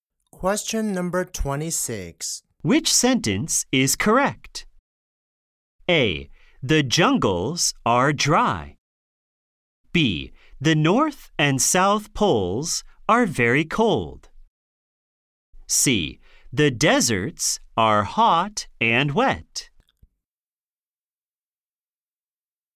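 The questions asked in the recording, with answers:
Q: Which sentence is correct?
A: B: The North and South Poles are very cold.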